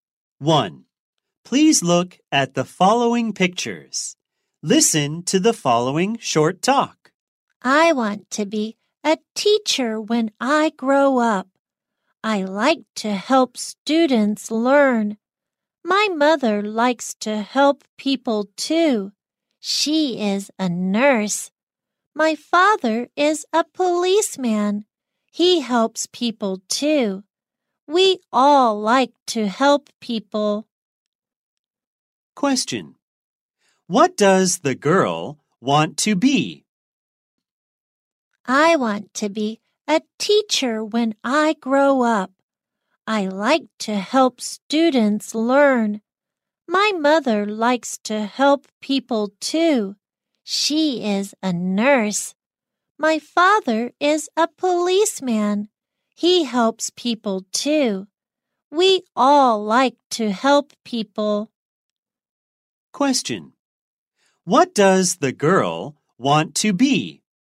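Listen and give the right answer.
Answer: A teacher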